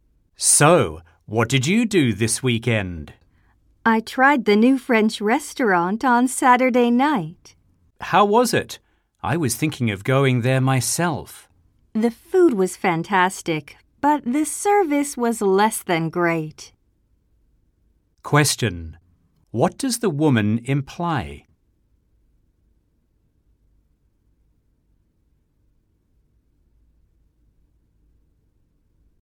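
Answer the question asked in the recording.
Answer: The restaurant's food was great but its service was poor.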